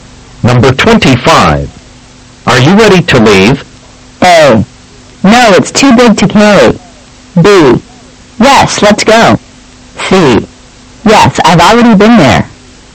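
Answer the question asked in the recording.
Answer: B: Yes, let's go.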